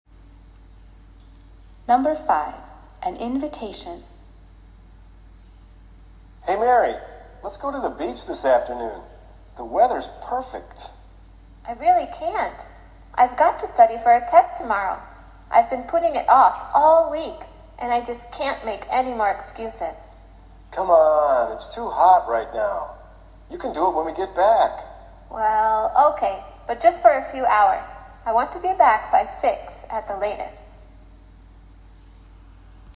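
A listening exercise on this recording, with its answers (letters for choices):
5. What does the woman decide to do?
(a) stay home and study all day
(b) study a little and then go to the beach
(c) go to the beach now and study later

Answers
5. c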